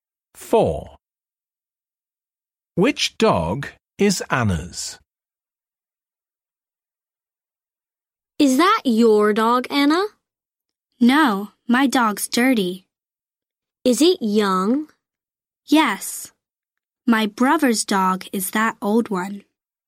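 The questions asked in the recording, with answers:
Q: Which dog is Anna's?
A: The young, dirty dog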